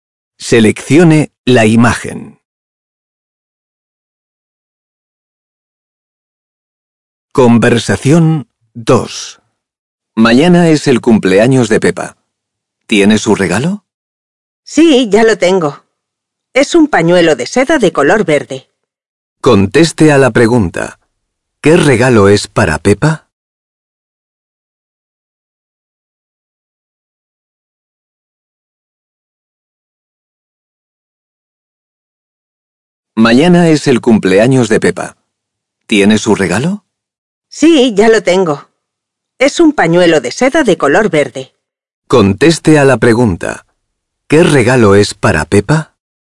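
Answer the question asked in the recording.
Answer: Un pañuelo de seda verde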